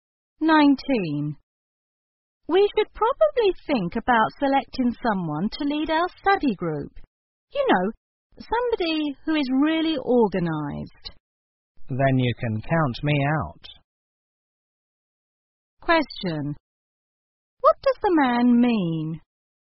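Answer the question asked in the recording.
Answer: He isn't organized, so he shouldn't lead the group.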